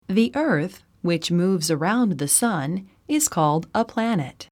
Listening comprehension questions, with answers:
英文の音声を聞いて空所のことばを記入しなさい。 音声は2度聞いてよい。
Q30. _____________ called a planet.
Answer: The earth, which moves around the sun, is